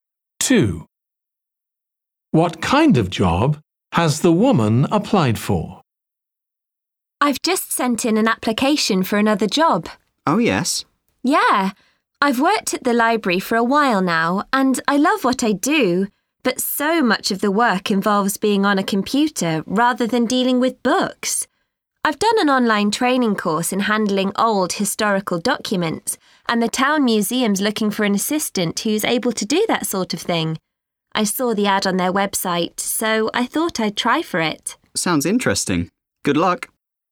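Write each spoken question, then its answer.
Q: What kind of job has the woman applied for?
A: a museum assistant job handling old historical documents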